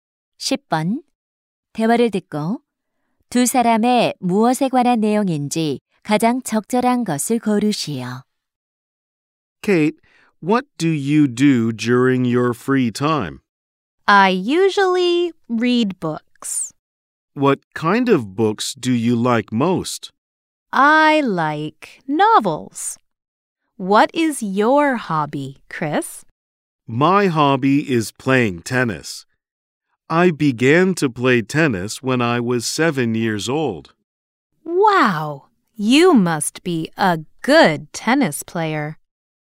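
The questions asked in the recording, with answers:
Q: 대화를 듣고 두 사람의 무엇에 관한 내용인지 가장 적절한 것을 고르시오.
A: 취미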